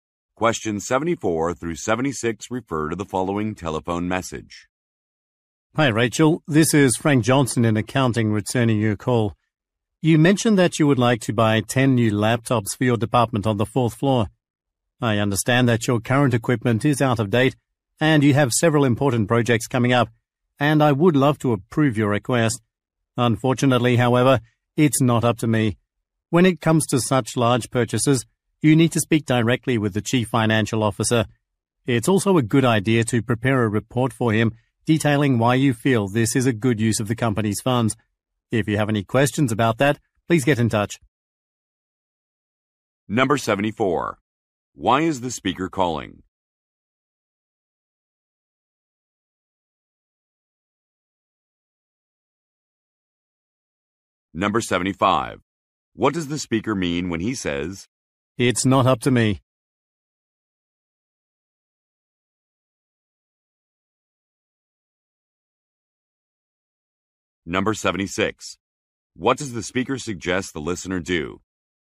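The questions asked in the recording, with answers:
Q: Why is the speaker calling?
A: To return Rachel's call about buying 10 new laptops

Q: What does the speaker mean when he says,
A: He doesn't have the authority to approve the purchase

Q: What does the speaker suggest the listener do?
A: Talk to the chief financial officer and prepare a report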